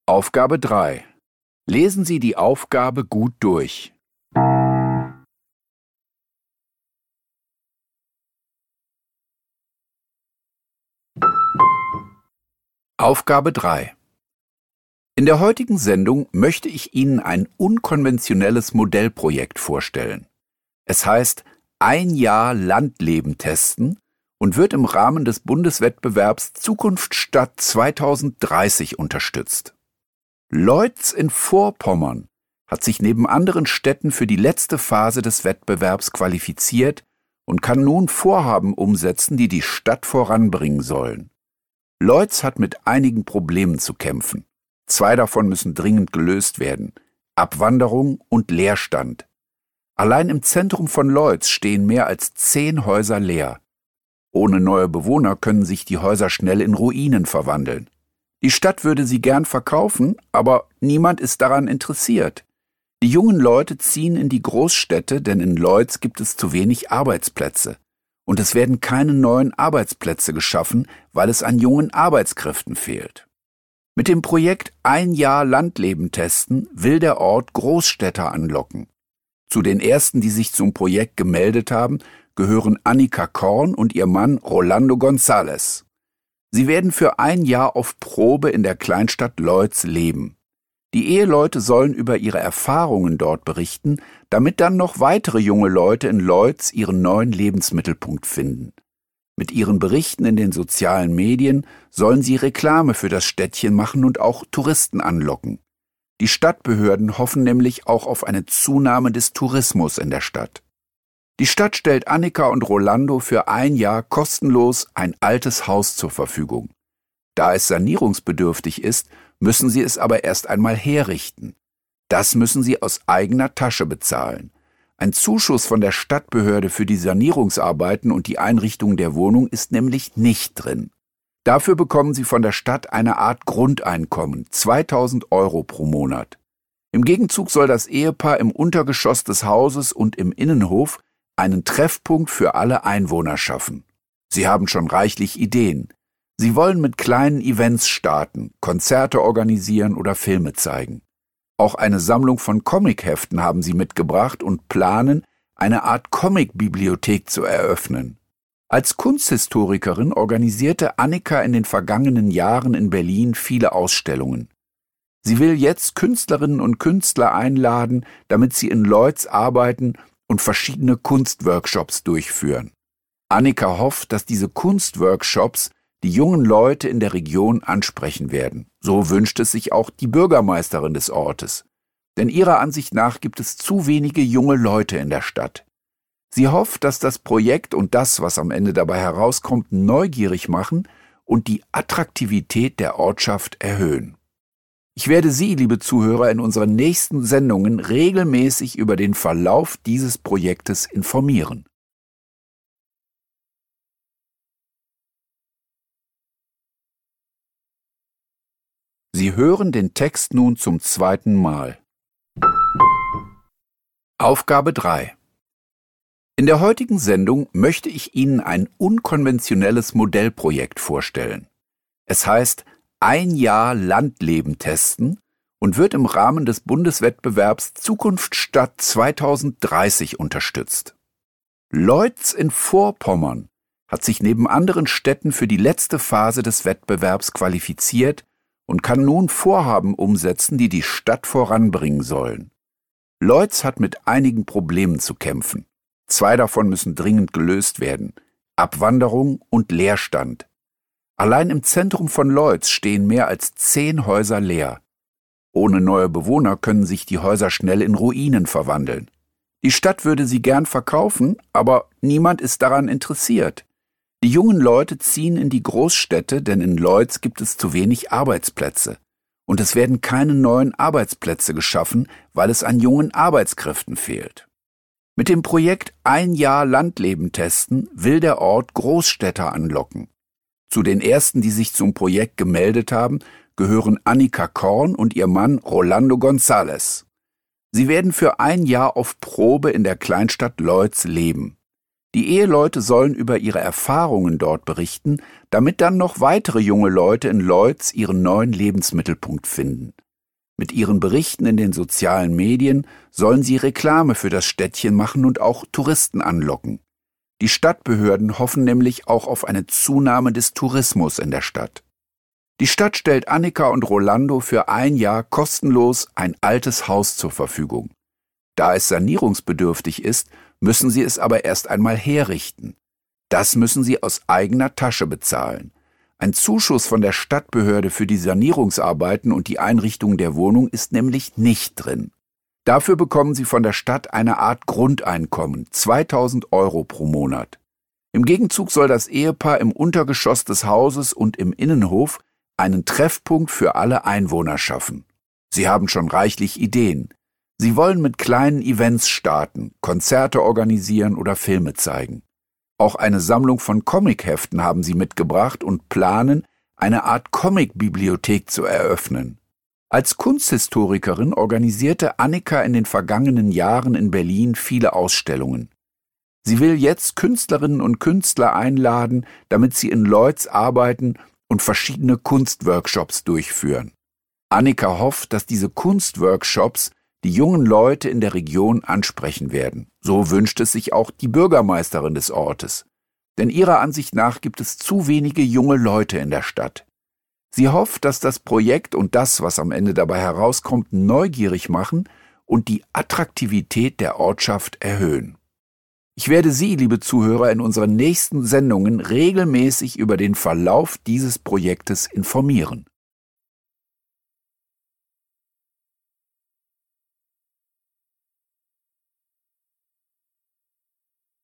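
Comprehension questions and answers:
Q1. Wenn sich die Situation nicht ändert, 3.1 .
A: können sich die Häuser schnell in Ruinen verwandeln

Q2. Sie werden auf Probe in Loitz wohnen und 3.2 .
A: in den sozialen Medien über ihre Erfahrungen berichten

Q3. Außerdem bekommen sie 3.3 .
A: ein Grundeinkommen von 2000 Euro pro Monat

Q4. Besonders den jungen Leuten in der Region will Annika ein Angebot machen, nämlich 3.4 .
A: Kunstworkshops mit eingeladenen Künstlern

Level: Poziom: dwujęzyczny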